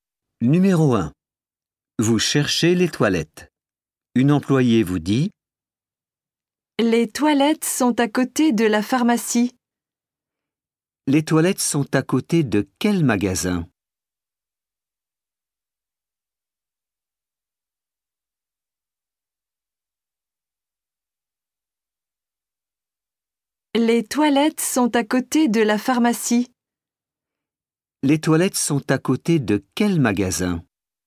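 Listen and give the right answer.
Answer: la pharmacie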